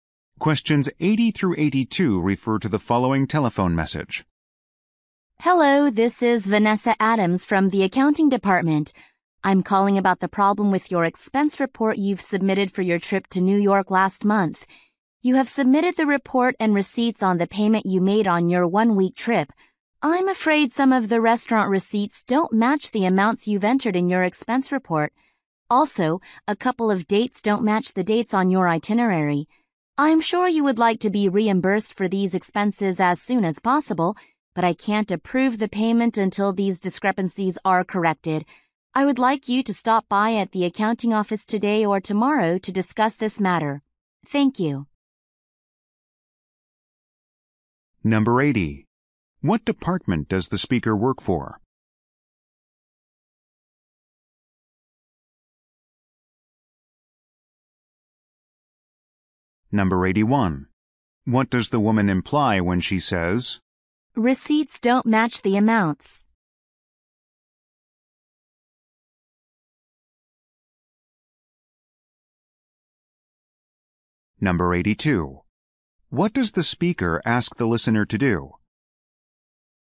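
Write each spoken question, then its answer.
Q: What department does the speaker work for?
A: Accounting

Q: What does the speaker ask the listener to do?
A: Stop by the accounting office today or tomorrow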